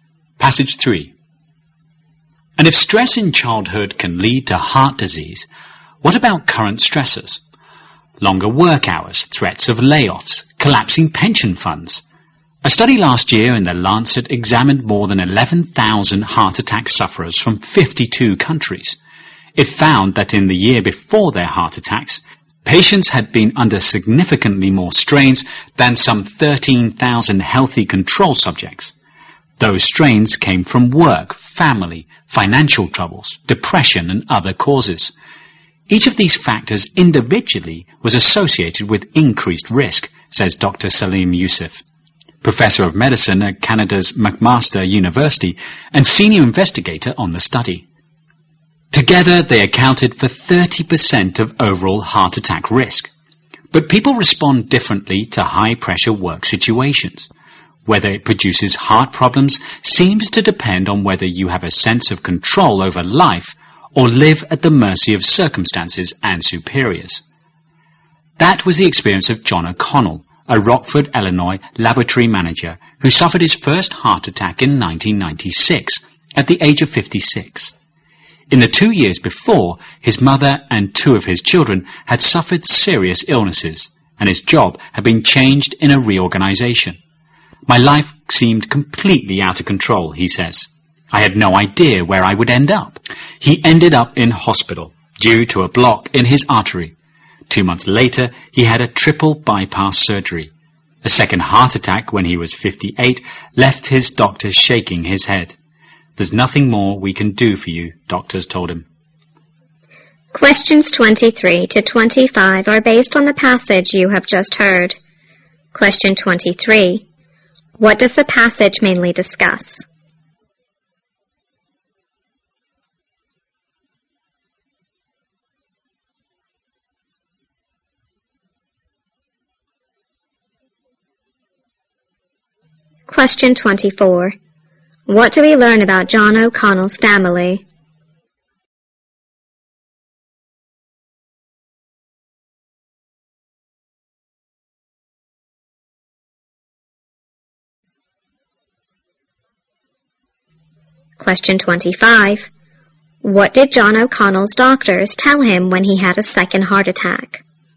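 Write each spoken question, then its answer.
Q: What does the passage mainly discuss?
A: The link between stress and heart disease

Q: What do we learn about John O'Connell's family?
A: His mother and two of his children suffered serious illnesses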